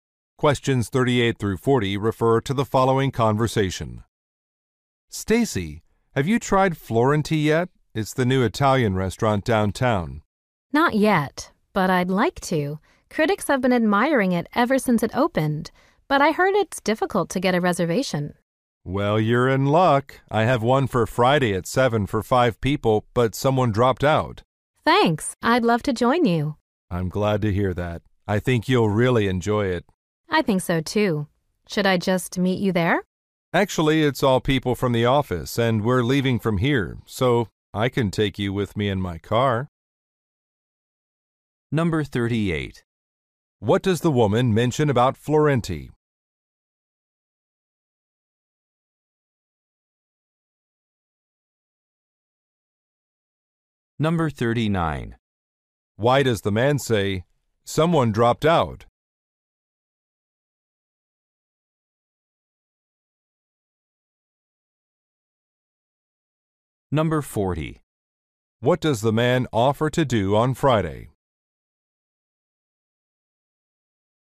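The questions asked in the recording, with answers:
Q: What does the woman mention about Florenti?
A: It is hard to get a reservation

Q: What does the man offer to do on Friday?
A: Drive her to the restaurant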